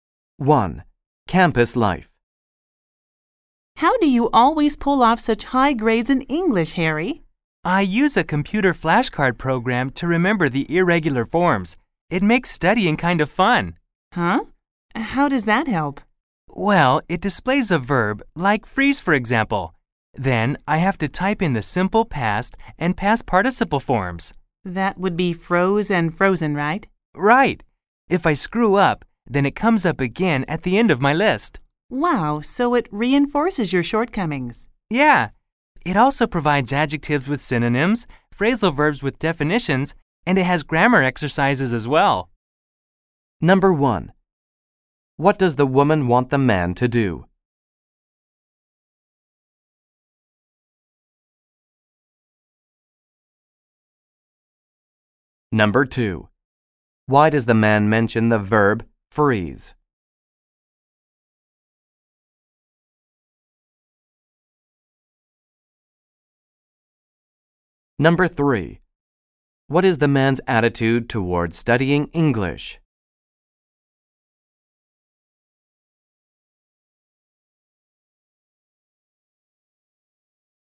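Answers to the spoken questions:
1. Explain how he gets such high grades in English
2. To give an example of how the flashcard program works
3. He enjoys it; the program makes studying fun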